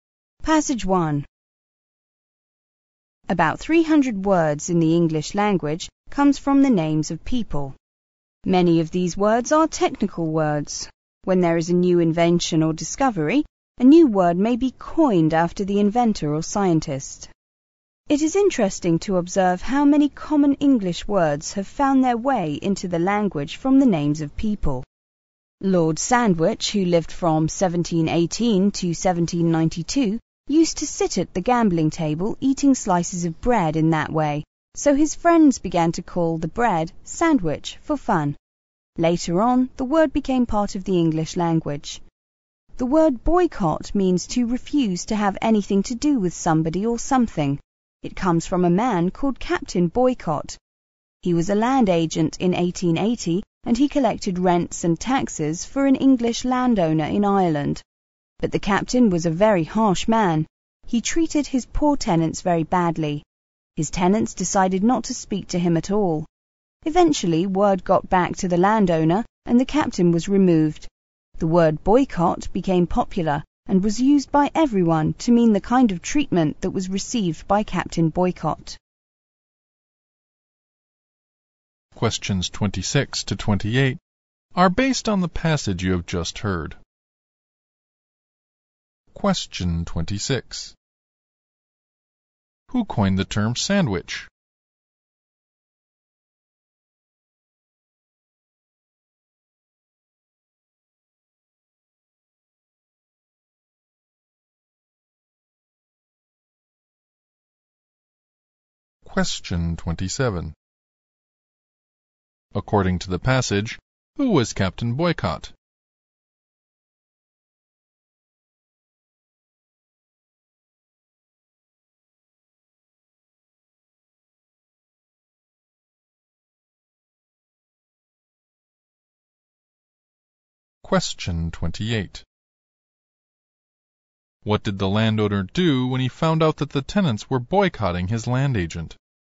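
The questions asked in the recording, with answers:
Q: Who coined the term sandwich?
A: Lord Sandwich's friends

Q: According to the passage, who was Captain Boycott?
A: A land agent who collected rents and taxes for an English landowner in Ireland

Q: What did the landowner do when he found out that the tenants were boycotting his land agent?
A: He removed Captain Boycott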